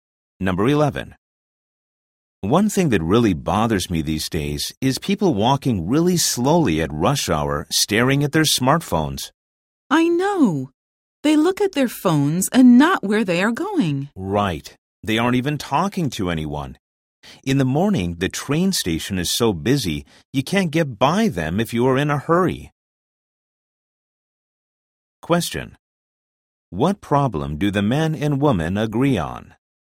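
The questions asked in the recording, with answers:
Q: What problem do the men and women agree on?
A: People walking slowly at rush hour while staring at their smartphones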